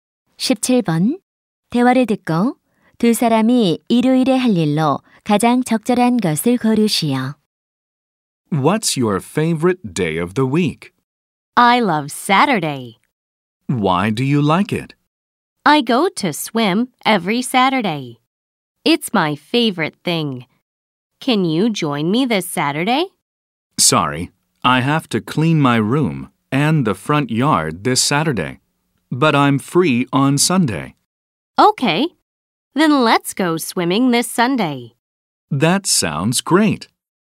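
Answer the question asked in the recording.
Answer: 수영하러 가기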